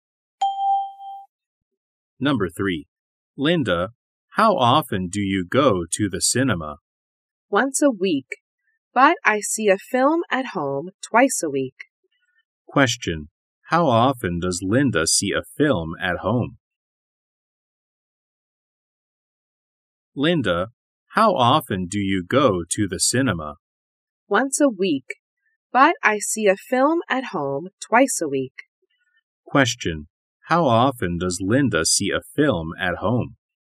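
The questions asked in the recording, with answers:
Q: How often does Linda see a film at home?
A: Twice a week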